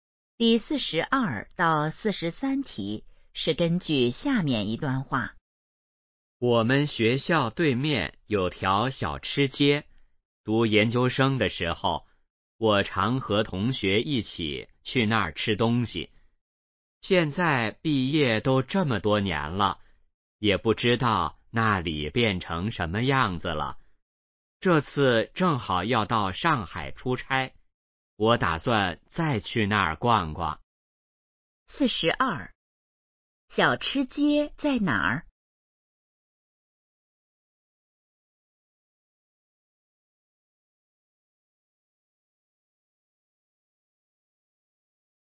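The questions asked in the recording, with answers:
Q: 小吃街在哪儿?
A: 学校对面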